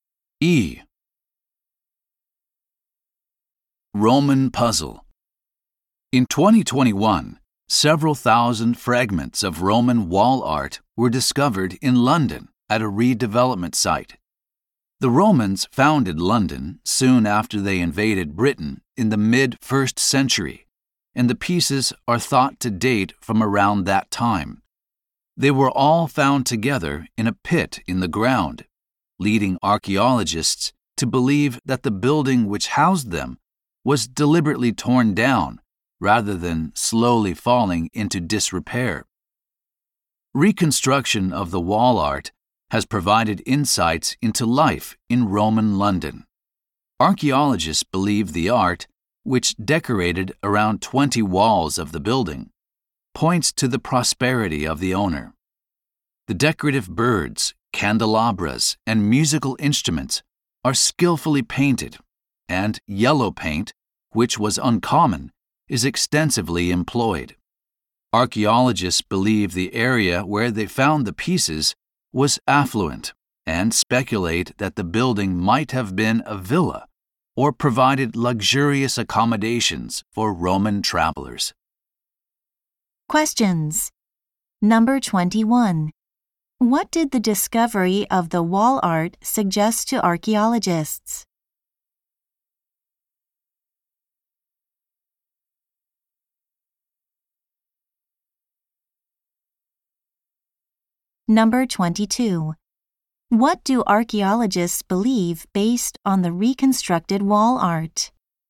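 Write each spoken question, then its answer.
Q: What did the discovery of the wall art suggest to archaeologists?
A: The building was deliberately torn down

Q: What do archaeologists believe based on the reconstructed wall art?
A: The building's owner was wealthy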